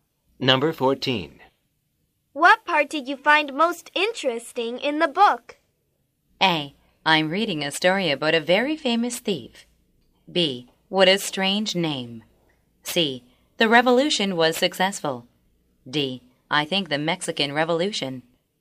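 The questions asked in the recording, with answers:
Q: What part did you find most interesting in the book?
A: D: I think the Mexican Revolution.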